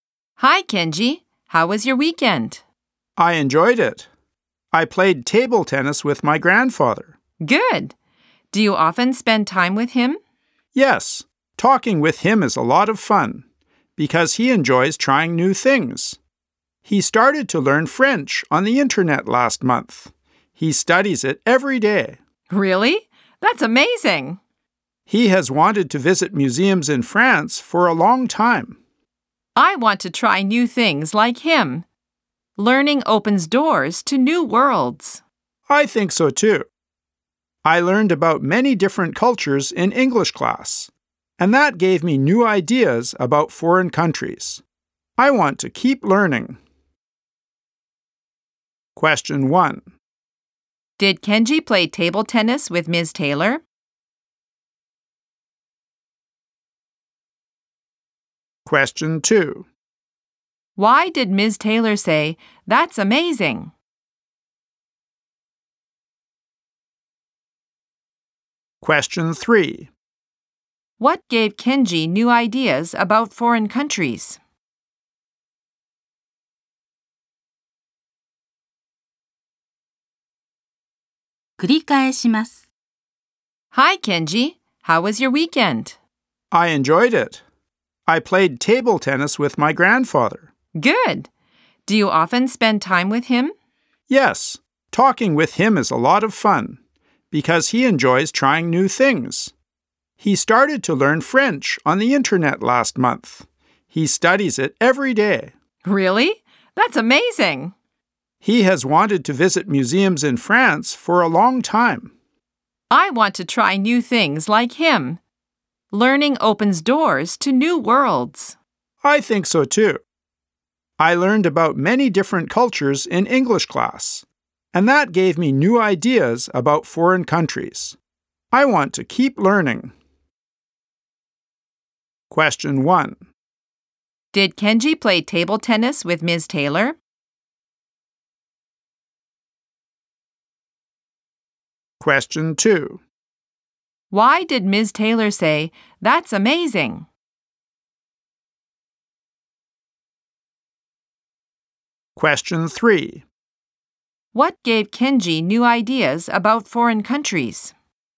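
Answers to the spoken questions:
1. No, he didn't. He played with his grandfather.
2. Because Kenji's grandfather started learning French on the internet and studies it every day.
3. Learning about many different cultures in English class.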